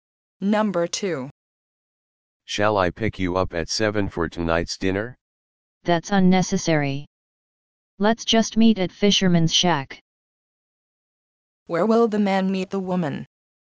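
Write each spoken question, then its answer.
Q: Where will the man meet the woman?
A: At Fisherman's Shack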